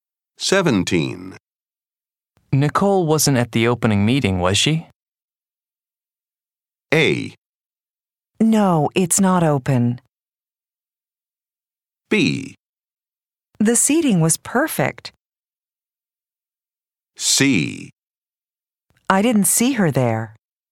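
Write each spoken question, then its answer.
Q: Nicole wasn't at the opening meeting, was she?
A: C: I didn't see her there.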